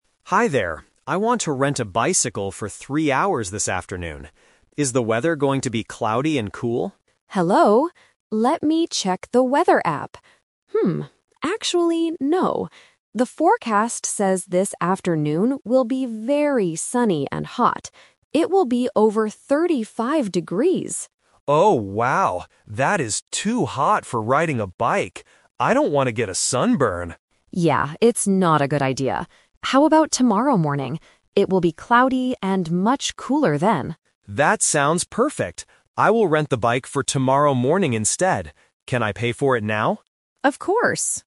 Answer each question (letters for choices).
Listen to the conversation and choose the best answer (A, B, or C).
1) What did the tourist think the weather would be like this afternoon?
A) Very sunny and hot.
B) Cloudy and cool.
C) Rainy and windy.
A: B

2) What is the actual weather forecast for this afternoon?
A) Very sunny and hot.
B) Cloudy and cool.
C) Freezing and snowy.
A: A

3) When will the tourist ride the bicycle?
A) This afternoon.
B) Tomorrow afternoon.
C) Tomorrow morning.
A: C

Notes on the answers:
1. The tourist asks at the beginning, "Is the weather going to be cloudy and cool?" because that was their expectation. Option (A) is the trap because it is the actual weather, not what the tourist initially thought. Option (C) is never mentioned.
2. The agent checks the app and says, "The forecast says this afternoon will be very sunny and hot." Option (B) is the trap because it was the tourist's guess (and the weather for tomorrow). Option (C) is not mentioned in the audio.
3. Because of the heat today, the agent suggests "tomorrow morning," and the tourist agrees: "I will rent the bike for tomorrow morning instead." Option (A) is the trap because it was the initial plan (Plan A). Option (B) is a plausible time but is not mentioned.

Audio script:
Tourist: Hi there. I want to rent a bicycle for three hours this afternoon. Is the weather going to be cloudy and cool?
Agent: Hello! Let me check the weather app. Hmm, actually, no. The forecast says this afternoon will be very sunny and hot. It will be over 35 degrees!
Tourist: Oh, wow. That is too hot for riding a bike. I don't want to get a sunburn.
Agent: Yeah, it's not a good idea. How about tomorrow morning? It will be cloudy and much cooler then.
Tourist: That sounds perfect. I will rent the bike for tomorrow morning instead. Can I pay for it now?